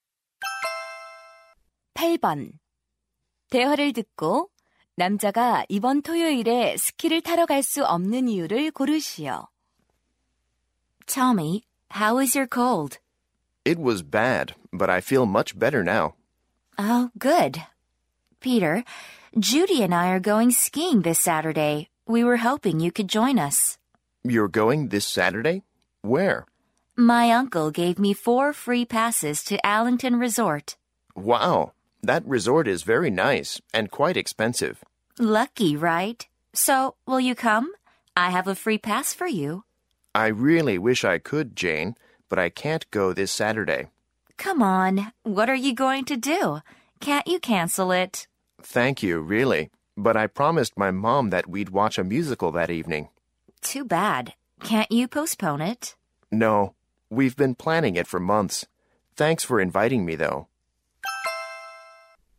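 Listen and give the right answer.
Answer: 엄마와 뮤지컬을 보기로 약속해서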